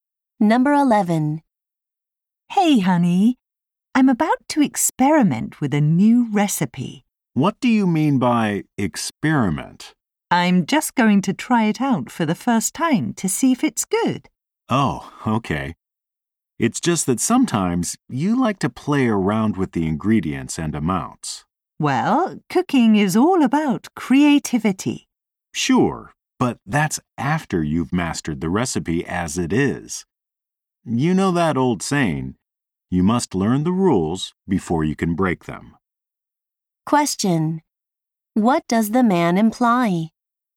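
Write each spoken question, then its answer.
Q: What does the man imply?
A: She should follow the recipe as written before changing it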